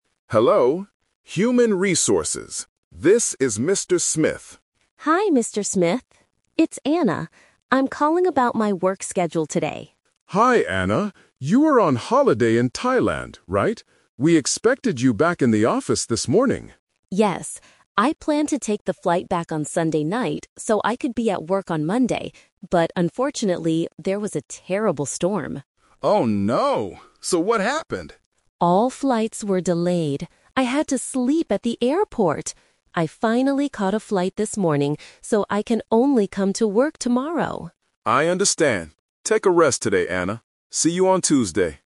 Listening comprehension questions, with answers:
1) When did Anna originally plan to be at work?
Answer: On Monday.

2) Why couldn't Anna fly back on Sunday night?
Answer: There was a bad storm.

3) What did Anna do last night?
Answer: She slept at the airport.

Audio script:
HR: Hello, Human Resources. This is Mr. Smith.
Employee: Hi, Mr. Smith. It's Anna. I'm calling about my work schedule today.
HR: Hi, Anna. You were on holiday in Thailand, right? We expected you back in the office this morning.
Employee: Yes. I planned to take the flight back on Sunday night so I could be at work on Monday. But unfortunately, there was a terrible storm.
HR: Oh no. So what happened?
Employee: All flights were delayed. I had to sleep at the airport! I finally caught a flight this morning, so I can only come to work tomorrow.